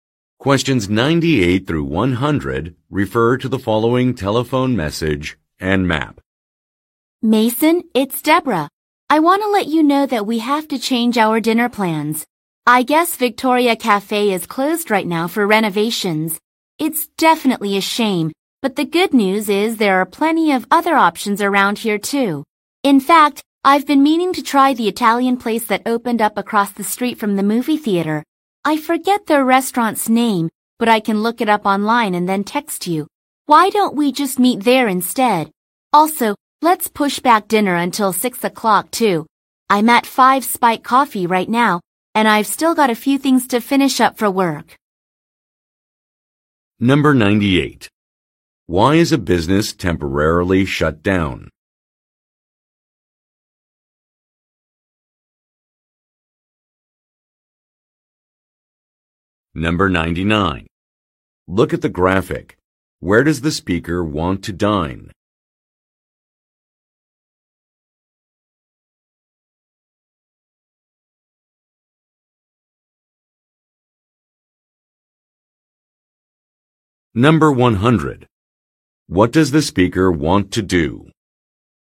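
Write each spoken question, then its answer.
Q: Why is a business temporarily shut down?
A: It is being renovated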